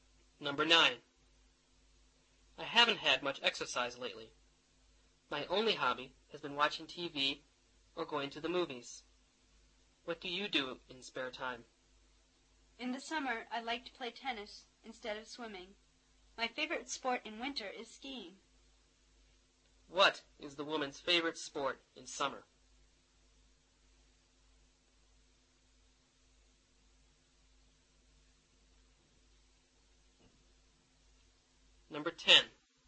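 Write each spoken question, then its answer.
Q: What is the woman's favorite sport in summer?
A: Tennis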